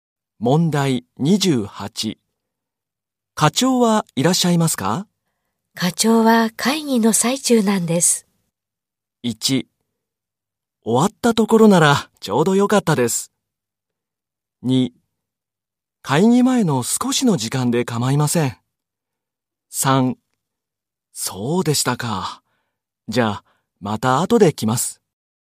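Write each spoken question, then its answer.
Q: 課長はいらっしゃいますか?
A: 3: そうでしたか。じゃあ、また後で来ます。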